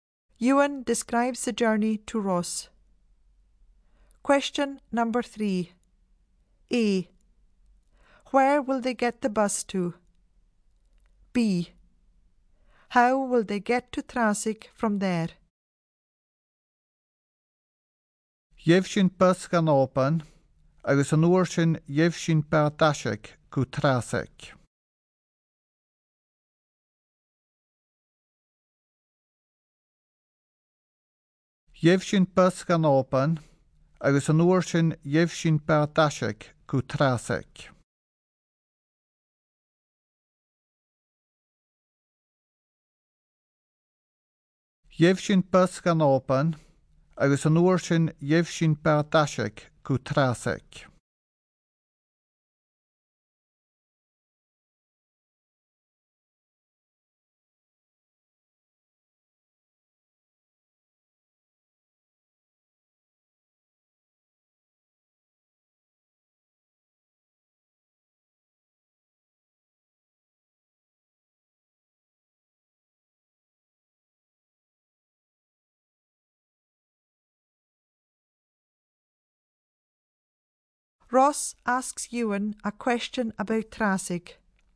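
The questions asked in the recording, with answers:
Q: A. Where will they get the bus to?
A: Oban

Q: B. How will they get to Trasig from there?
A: By ferry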